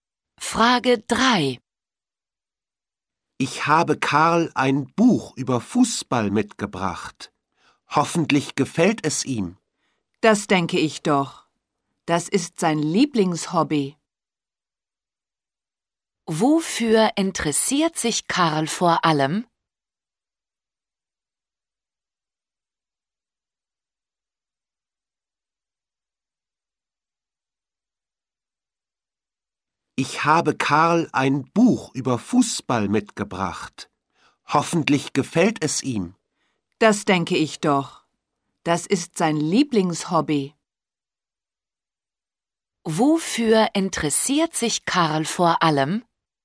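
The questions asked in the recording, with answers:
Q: Wofür interessiert sich Karl vor allem?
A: Fußball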